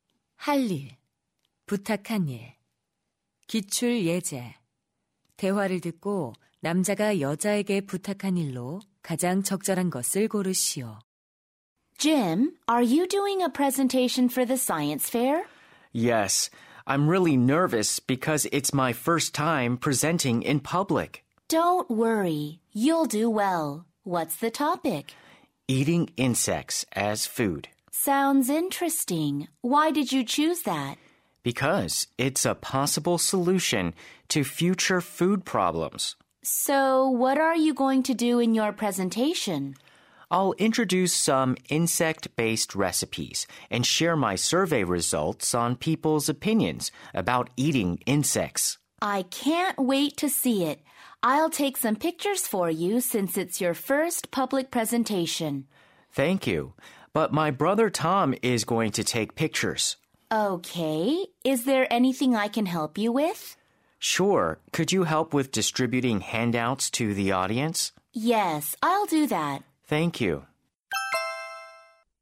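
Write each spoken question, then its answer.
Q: 대화를 듣고 남자가 여자에게 부탁한 일로 가장 적절한 것을 고르시오.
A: 청중에게 유인물 나눠 주는 것 돕기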